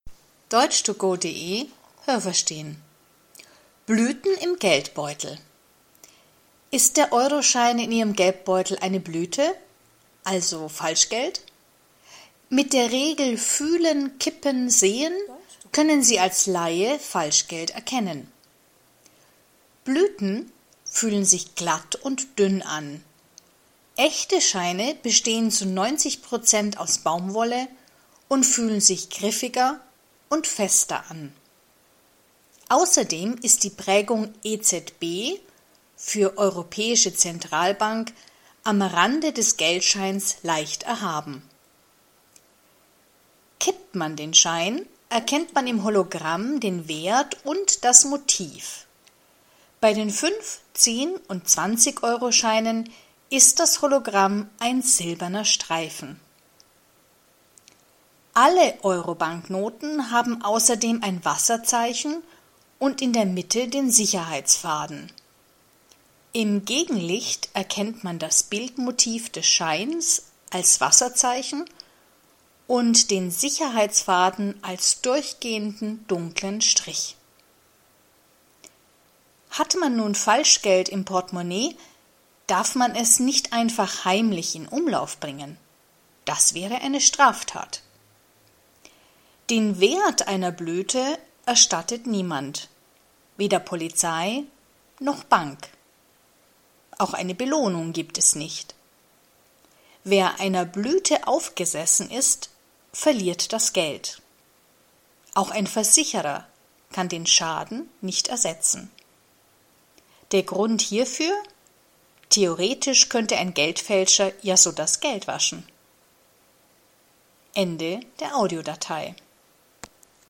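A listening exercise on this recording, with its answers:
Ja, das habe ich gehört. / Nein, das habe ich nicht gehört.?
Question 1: Die drei Schritte, mit denen man echtes Geld erkennen kann, heißen: Fühlen – Tippen – Sehen.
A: Nein, das habe ich nicht gehört.

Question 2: Jeder echte Geldschein besteht zu 90 % aus Baumwolle und fühlt sich glatt an.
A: Nein, das habe ich nicht gehört.

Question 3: Bei echten Scheinen kann man die Prägung „EZB" (= Europäische Zentralbank) fühlen.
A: Ja, das habe ich gehört.

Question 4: Bei einem Fünfzig-Euroschein ist das Hologramm ein silberner Streifen.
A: Nein, das habe ich nicht gehört.

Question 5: Alle Euroscheine haben in der Mitte ein Wasserzeichen.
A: Nein, das habe ich nicht gehört.

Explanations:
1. Die drei Schritte heißen: Fühlen – K ippen – Sehen
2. Er besteht zwar aus Baumwolle, aber er fühlt sich griffig an.
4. Nur bei Fünf-, Zehn- und Zwanzig-Euroscheinen ist das Hologramm ein silberner Streifen.
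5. Alle Euroscheine haben in der Mitte einen Sicherheitsfaden.

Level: C2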